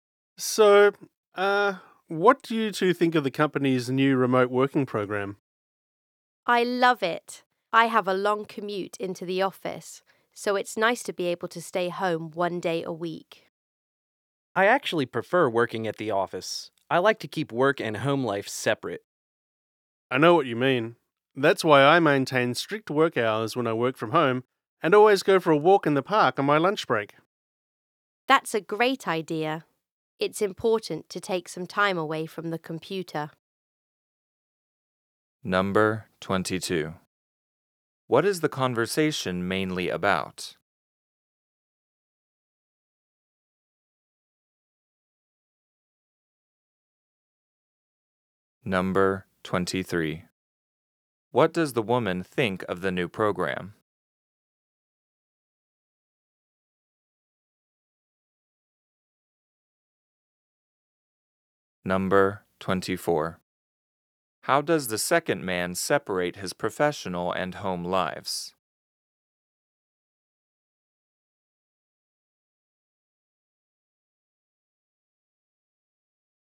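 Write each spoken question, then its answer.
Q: What is the conversation mainly about?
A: The company's new remote working program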